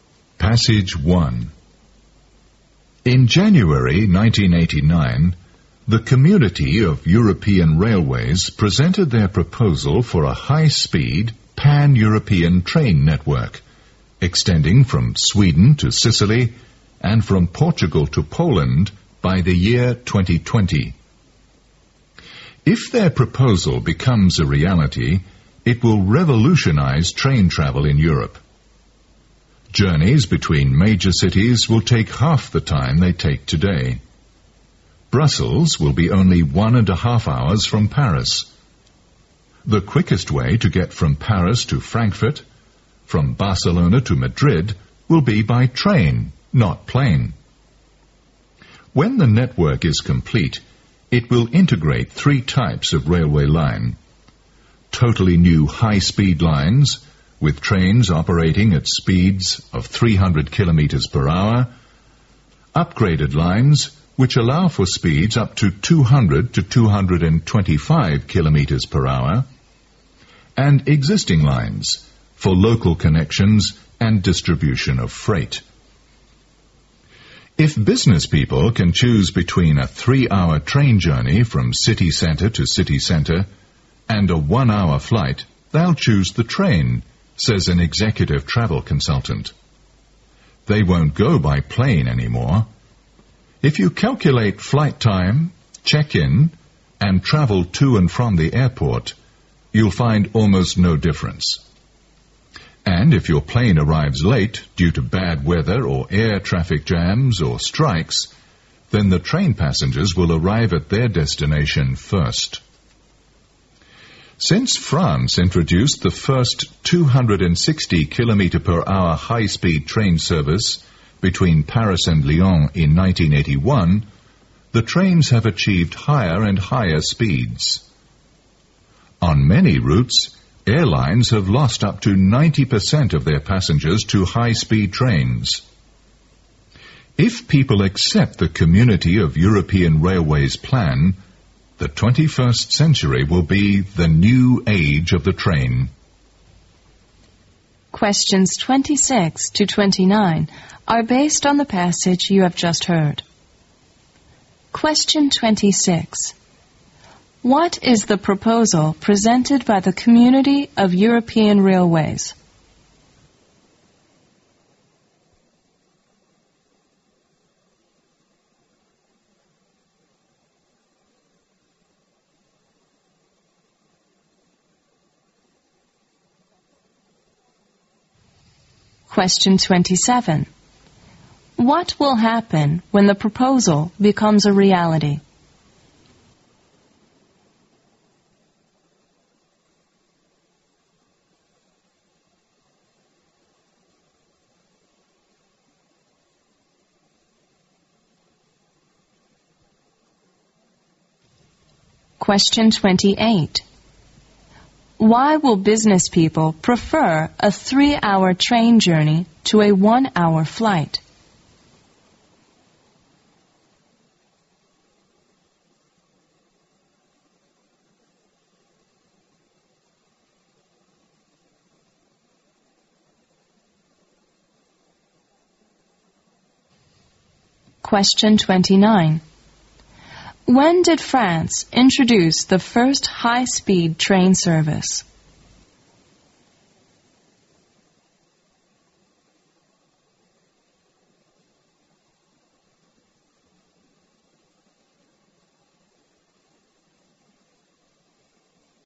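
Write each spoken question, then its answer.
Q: What is the proposal presented by the Community of European Railways?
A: A high-speed pan-European train network from Sweden to Sicily and Portugal to Poland by 2020

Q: What will happen when the proposal becomes a reality?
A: It will revolutionize train travel in Europe; journeys between major cities will take half the time

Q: Why will business people prefer a 3-hour train journey to a 1-hour flight?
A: Counting check-in and airport travel there is almost no time difference, and trains avoid delays from weather, air traffic or strikes

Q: When did France introduce the first high-speed train service?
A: In 1981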